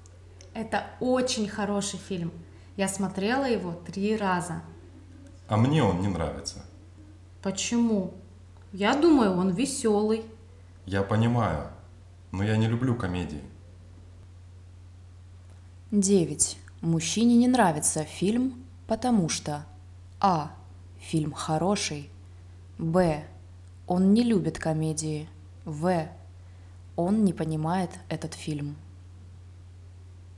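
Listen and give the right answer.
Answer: Б: он не любит комедии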